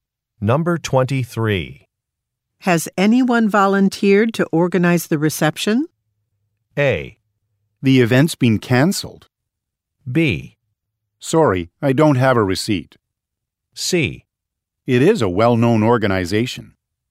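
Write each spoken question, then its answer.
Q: Has anyone volunteered to organize the reception?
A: A: The event's been canceled.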